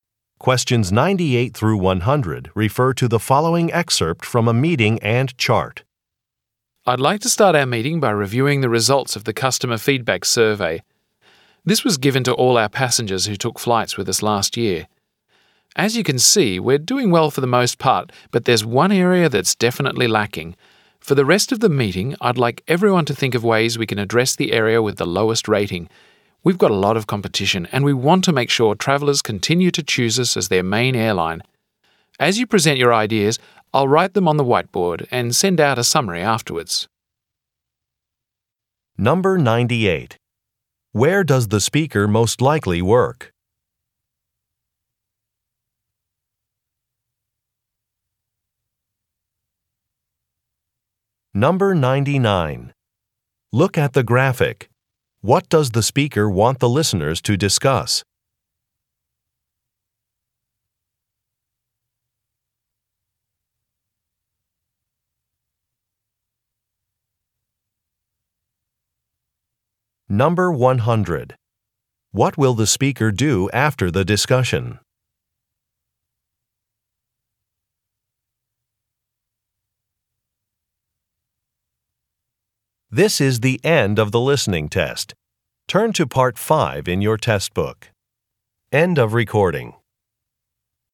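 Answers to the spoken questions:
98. At an airline
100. Send out a summary of the ideas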